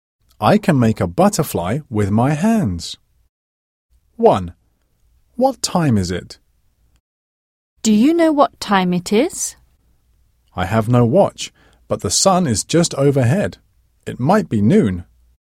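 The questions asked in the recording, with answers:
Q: What time is it?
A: noon (12 o'clock)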